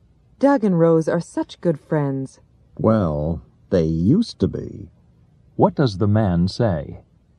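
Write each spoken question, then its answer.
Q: What does the man say?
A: Doug and Rose are no longer good friends.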